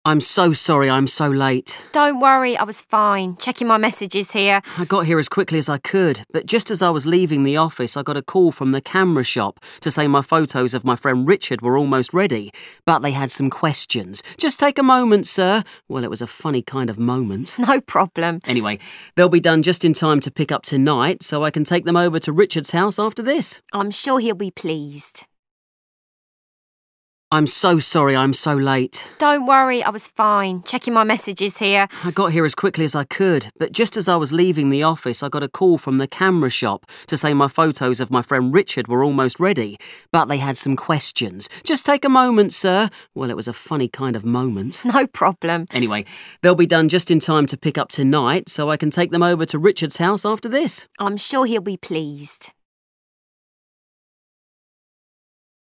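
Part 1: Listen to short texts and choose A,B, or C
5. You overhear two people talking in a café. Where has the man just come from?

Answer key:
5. His office.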